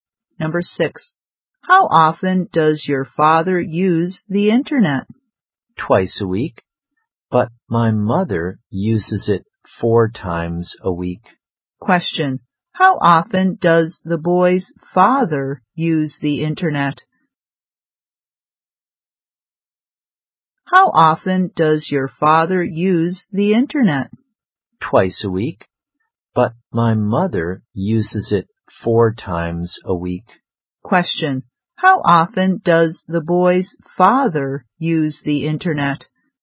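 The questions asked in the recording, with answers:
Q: How often does the boy's father use the internet?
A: Twice a week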